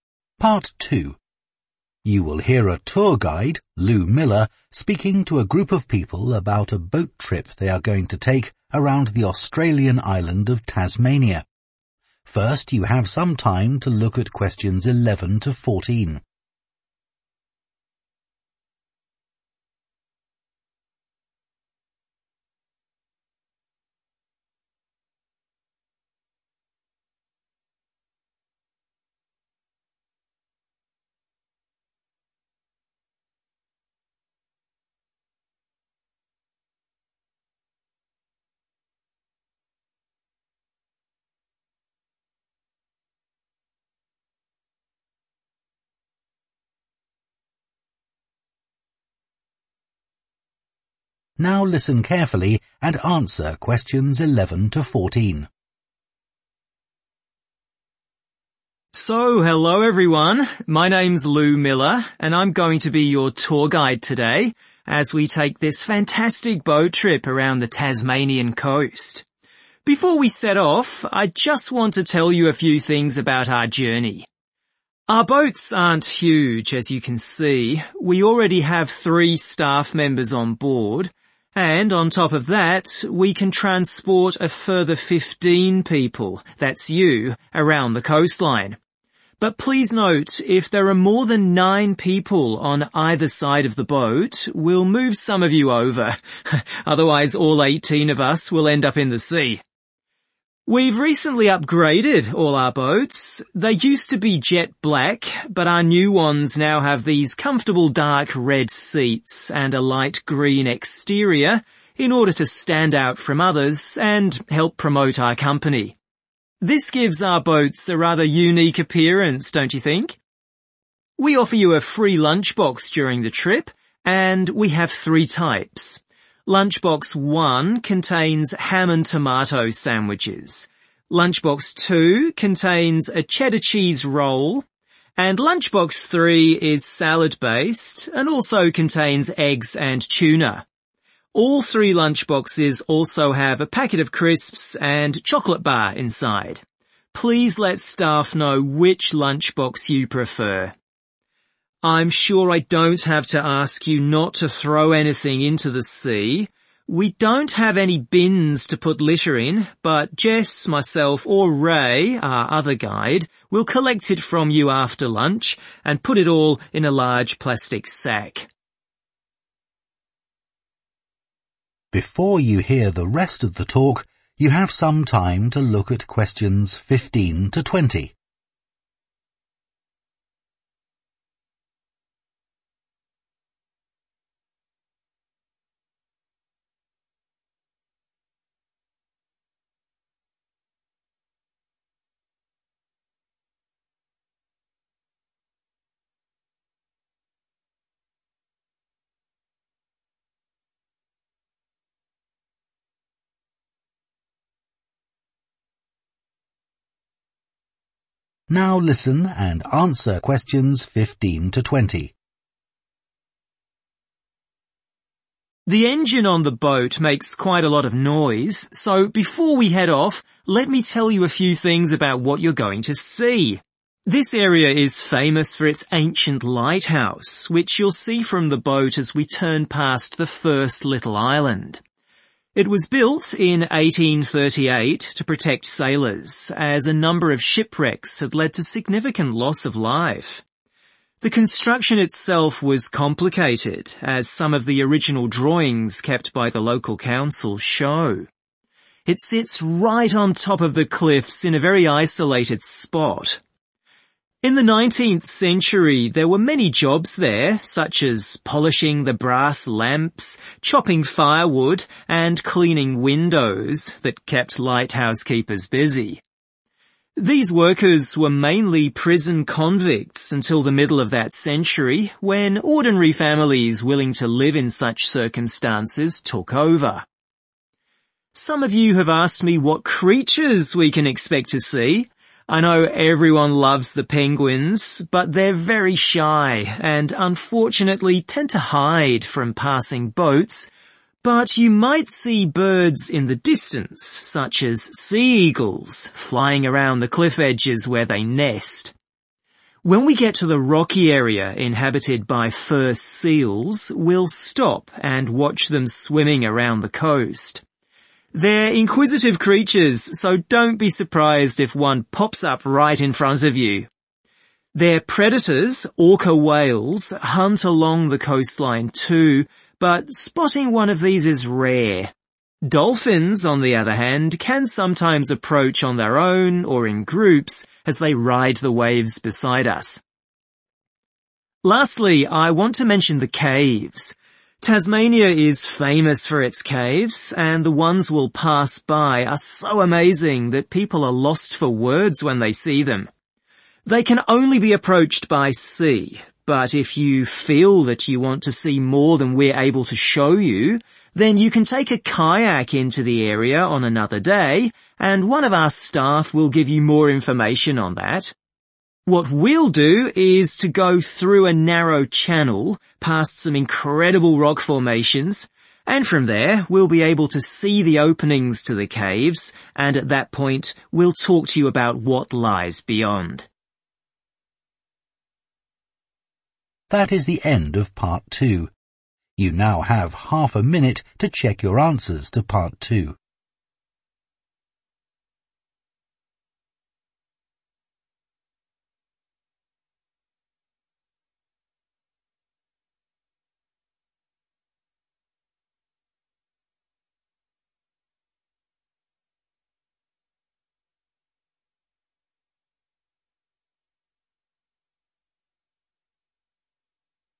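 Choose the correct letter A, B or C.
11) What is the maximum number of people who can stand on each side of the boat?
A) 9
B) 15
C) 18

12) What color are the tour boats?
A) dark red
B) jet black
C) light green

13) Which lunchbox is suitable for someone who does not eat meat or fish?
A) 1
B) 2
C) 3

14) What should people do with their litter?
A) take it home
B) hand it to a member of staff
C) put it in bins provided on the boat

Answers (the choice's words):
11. 9
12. light green
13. 2
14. hand it to a member of staff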